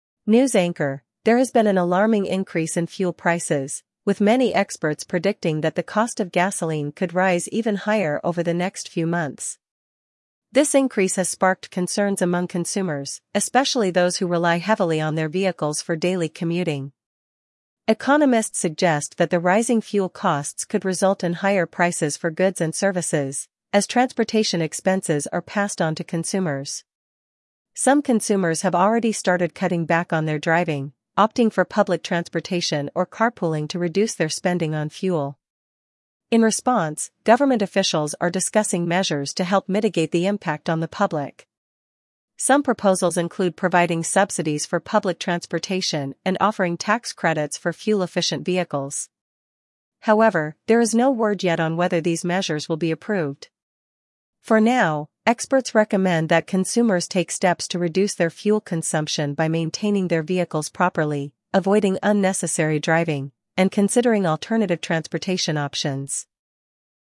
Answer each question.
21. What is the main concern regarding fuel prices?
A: Rising fuel prices

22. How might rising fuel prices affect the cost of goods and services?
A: Increase in prices of goods

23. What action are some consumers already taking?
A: Carpooling or public transport

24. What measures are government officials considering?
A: Public transport subsidies, tax credits

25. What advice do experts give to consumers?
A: Maintain vehicles, reduce driving

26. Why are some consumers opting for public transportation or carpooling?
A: To save on fuel costs

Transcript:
News Anchor: There has been an alarming increase in fuel prices, with many experts predicting that the cost of gasoline could rise even higher over the next few months. This increase has sparked concerns among consumers, especially those who rely heavily on their vehicles for daily commuting.
Economists suggest that the rising fuel costs could result in higher prices for goods and services, as transportation expenses are passed on to consumers. Some consumers have already started cutting back on their driving, opting for public transportation or carpooling to reduce their spending on fuel.
In response, government officials are discussing measures to help mitigate the impact on the public. Some proposals include providing subsidies for public transportation and offering tax credits for fuel-efficient vehicles. However, there is no word yet on whether these measures will be approved.
For now, experts recommend that consumers take steps to reduce their fuel consumption by maintaining their vehicles properly, avoiding unnecessary driving, and considering alternative transportation options.